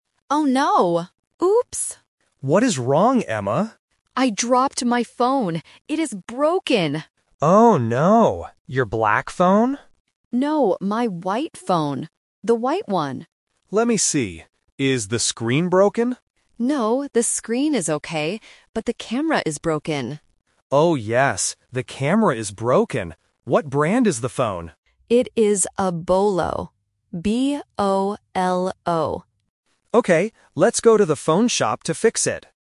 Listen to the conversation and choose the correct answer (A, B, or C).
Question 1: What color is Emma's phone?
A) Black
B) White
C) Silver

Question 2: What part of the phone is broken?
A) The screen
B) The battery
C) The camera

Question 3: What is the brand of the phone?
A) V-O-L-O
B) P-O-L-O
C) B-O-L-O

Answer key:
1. B
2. C
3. C

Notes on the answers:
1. The correct answer is B. Emma says, "No, my white phone." Option A (Black) is the trap because Mark asks "Your black phone?", but Emma rejects it. Option C (Silver) is a plausible phone color but is not mentioned in the audio.
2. The correct answer is C. Emma explicitly says, "the camera is broken." Option A (The screen) is the trap because Mark asks "Is the screen broken?", but Emma answers "No, the screen is okay." Option B (The battery) is not mentioned.
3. The correct answer is C. Emma clearly spells the brand name: "B-O-L-O". Option A (V-O-L-O) and Option B (P-O-L-O) are traps because the letters "V", "P", and "B" have similar sounds and are often confused by beginners in English listening.

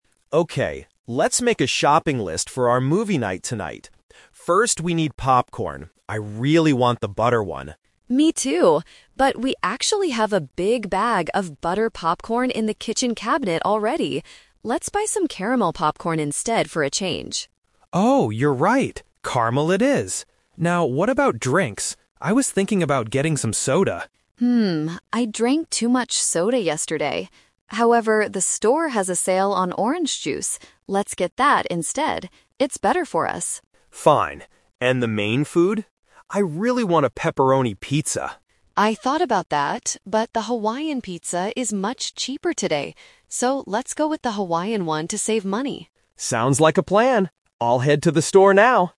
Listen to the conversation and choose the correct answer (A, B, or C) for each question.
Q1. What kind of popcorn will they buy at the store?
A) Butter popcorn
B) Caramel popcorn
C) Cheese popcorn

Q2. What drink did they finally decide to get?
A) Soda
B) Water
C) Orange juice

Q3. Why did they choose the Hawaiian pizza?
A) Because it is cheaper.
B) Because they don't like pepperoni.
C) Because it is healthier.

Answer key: 1B, 2C, 3A

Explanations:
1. Kevin wants butter popcorn (Option A is the trap), but Amy points out they already have it at home. So, they decide to buy caramel popcorn instead.
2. Kevin suggests soda (Option A is the trap), but Amy mentions she drank too much of it yesterday and suggests orange juice because it's on sale and "better for them."
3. Kevin originally wanted pepperoni pizza (Option B is the trap), but Amy says the Hawaiian pizza is "much cheaper" and they should get it to "save money."

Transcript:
Kevin: Okay, let's make a shopping list for our movie night tonight. First, we need popcorn. I really want the butter one.
Amy: Me too, but we actually have a big bag of butter popcorn in the kitchen cabinet already. Let's buy some caramel popcorn instead for a change.
Kevin: Oh, you're right! Caramel it is. Now, what about drinks? I was thinking about getting some soda...
Amy: Hmm, I drank too much soda yesterday. However, the store has a sale on orange juice. Let's get that instead. It's better for us.
Kevin: Fine. And the main food? I really want a pepperoni pizza.
Amy: I thought about that, but the Hawaiian pizza is much cheaper today. So, let's go with the Hawaiian one to save money.

